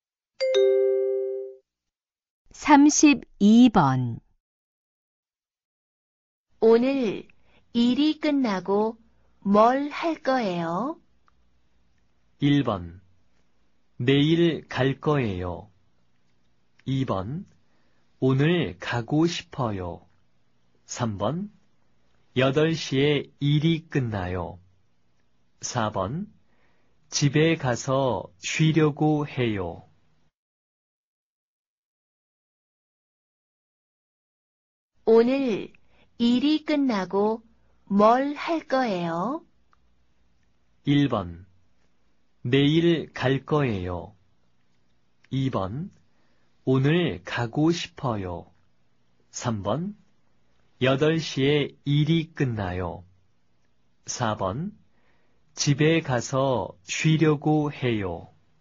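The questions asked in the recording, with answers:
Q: 오늘 일이 끝나고 뭘 할 거예요?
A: 4: 집에 가서 쉬려고 해요.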